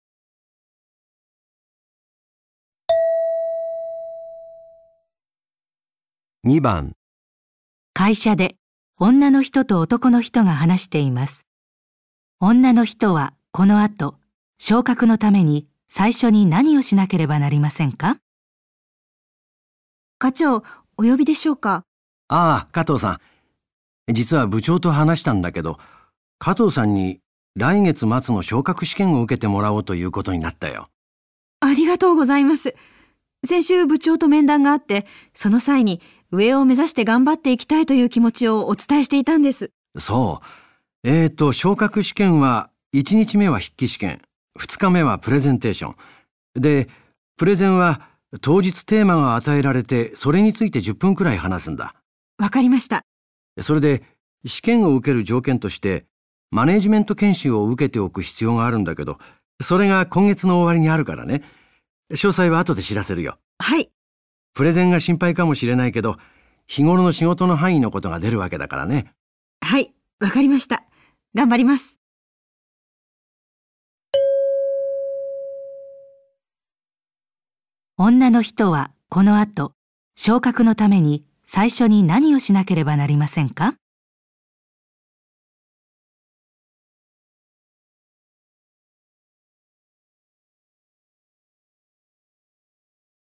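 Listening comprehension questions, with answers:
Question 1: 女の人はこの後、昇格のために最初に何をしなければなりませんか?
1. 部長と面談する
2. 筆記試験を受ける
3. プレゼンテーションをする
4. 研修を受ける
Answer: 研修を受ける

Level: N1

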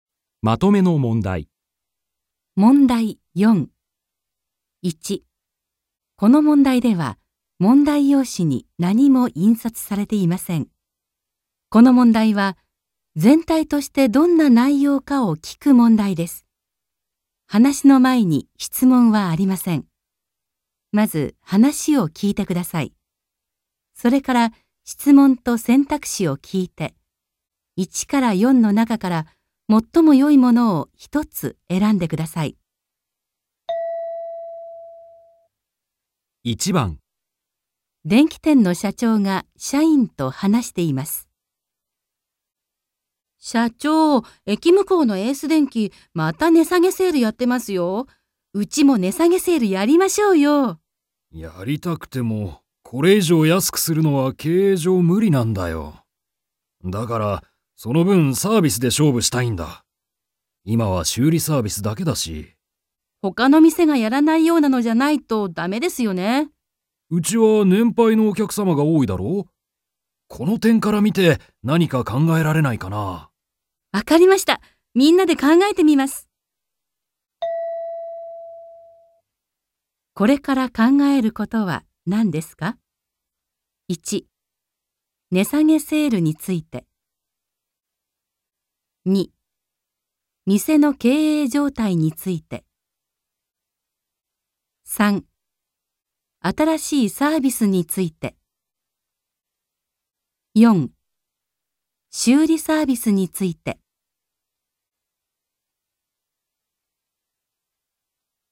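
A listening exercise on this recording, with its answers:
1.この問題では、問題用紙に何も印刷されていません。この問題は、全体としてどんな内容かを 聞く問題です。話の前に質問はありません。まず話を聞いてください。それから、質問 と選択肢を聞いて、1から4の中から、最もよいものを一つ選んでください。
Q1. これから考えることは何ですか。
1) 値下げセールについて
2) 店の経営状態について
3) 新しいサービスについて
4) 修理サービスについて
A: 新しいサービスについて

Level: N2

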